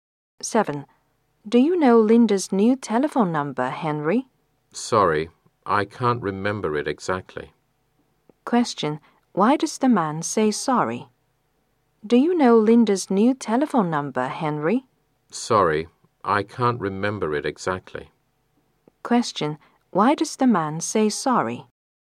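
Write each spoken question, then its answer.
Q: Why does the man say sorry?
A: He can't remember Linda's new telephone number exactly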